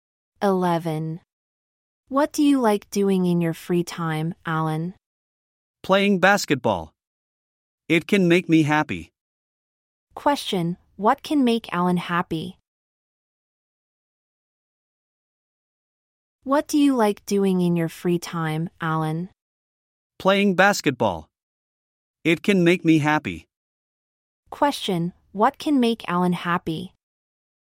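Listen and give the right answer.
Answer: Playing basketball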